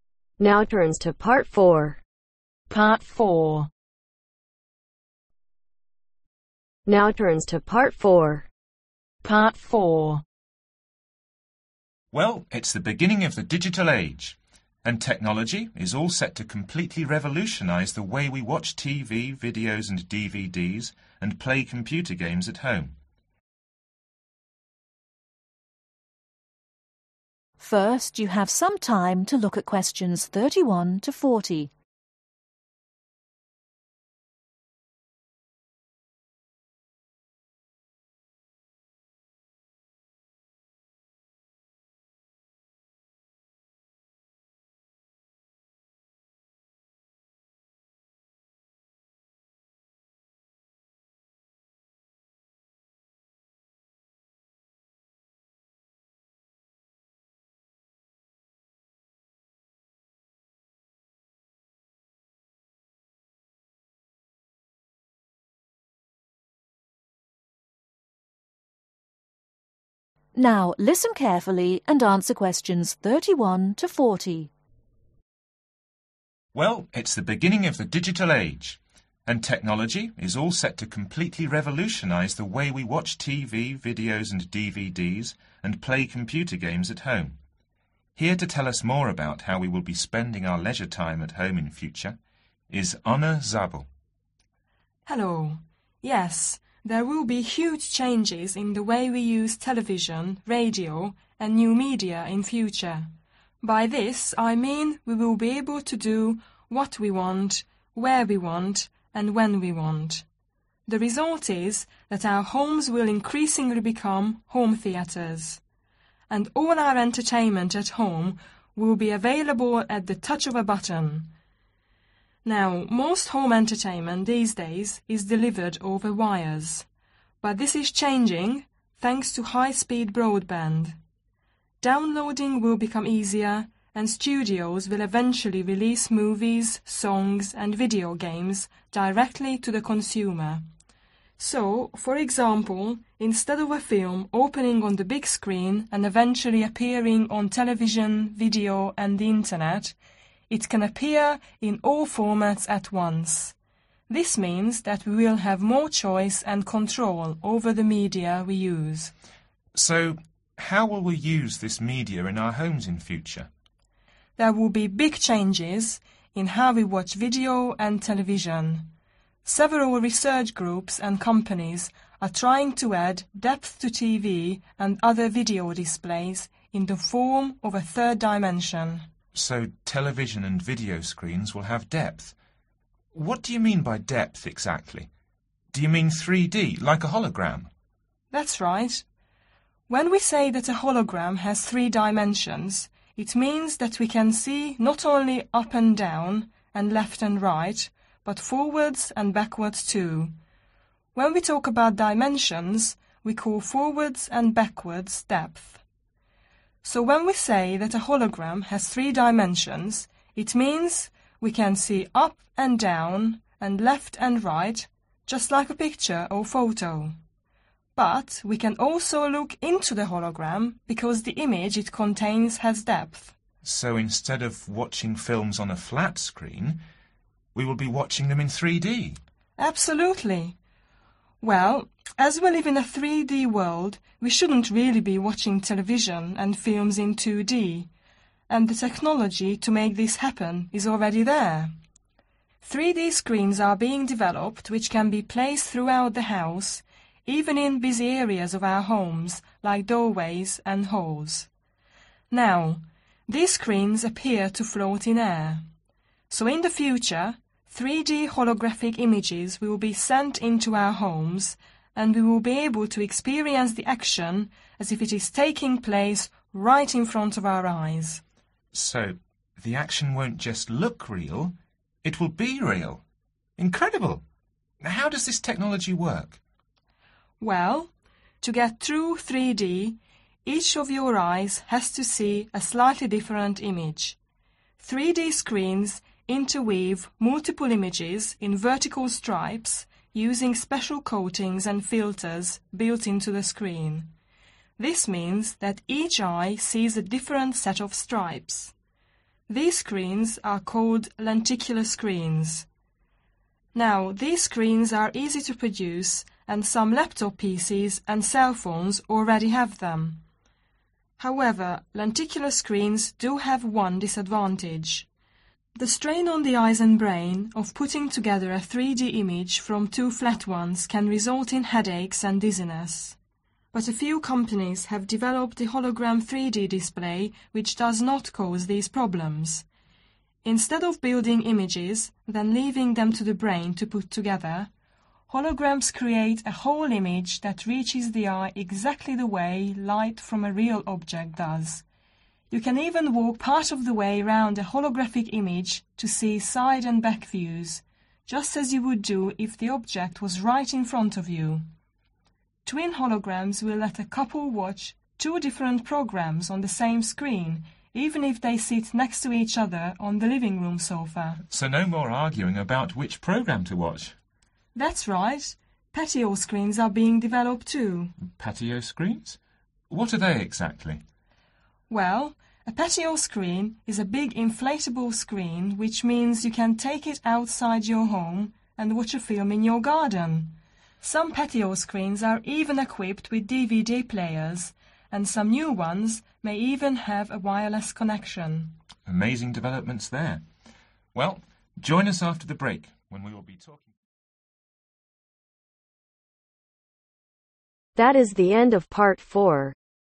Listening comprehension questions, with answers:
Complete the information below. Write ONE WORD ONLY for each answer.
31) New technology are changing the way we use media, and the home of the future will be like a personal (31)............ .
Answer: Theatre

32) The process of (32)............ will become easier due to high-speed broadband giving us more choice and (33)............ over what and when we view.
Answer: Downloading

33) The process of (32)............ will become easier due to high-speed broadband giving us more choice and (33)............ over what and when we view.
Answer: Control

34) Studios will eventually release films, songs and (34)............ games directly to the consumer.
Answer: Video

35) 3-D screens will replace (35)............ screens.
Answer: Flat

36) This added dimension will enable us to see the image itself because the hologram screen contains (36)............ .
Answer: Depth

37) We will able to see the action from holographic films as if taking (37)............ in front of us.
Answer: Place

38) To see 3-D each eye needs to see a different (38)............ .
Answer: Image

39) With a holographic image we can walk around it partly and see (39)............ and back views.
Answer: Side

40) With patio screens we can take them into the garden as their connection is (40)............ .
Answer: Wireless